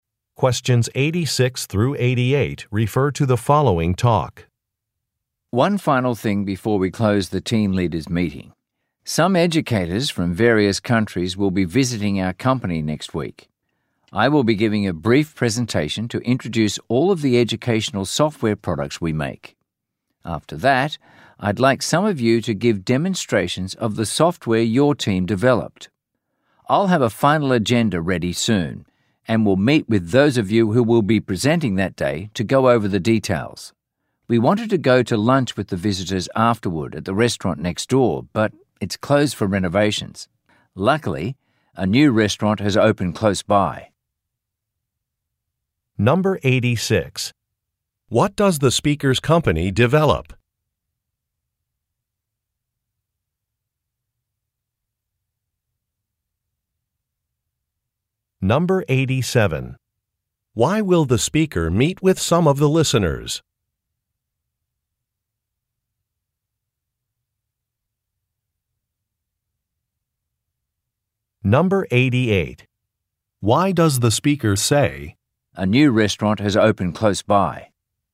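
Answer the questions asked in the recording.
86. Educational software
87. To go over the details of their presentations
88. To suggest another place to have lunch with the visitors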